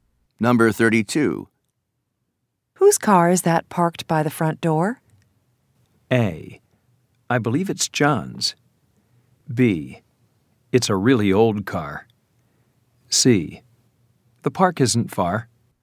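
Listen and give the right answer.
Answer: A: I believe it's John's.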